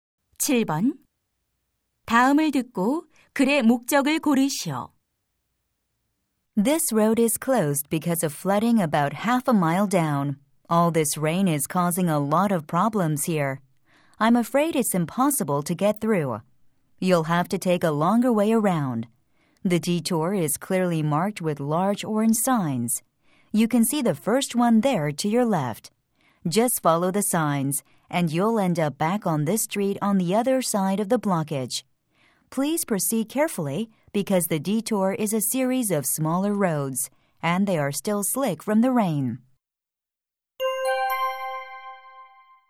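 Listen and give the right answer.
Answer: 도로 폐쇄에 따른 우회로 안내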